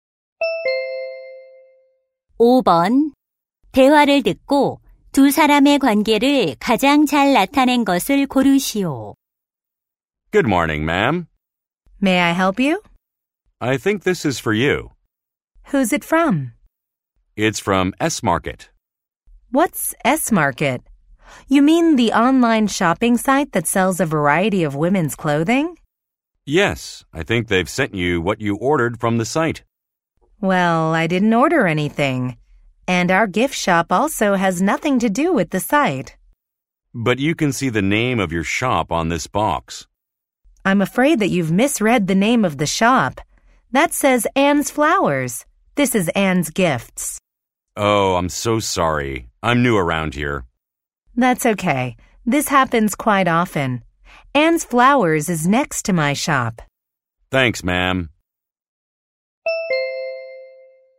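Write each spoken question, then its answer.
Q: 대화를 듣고 두 사람의 관계를 가장 잘 나타낸 것을 고르시오.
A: 택배 기사 - 선물 가게 주인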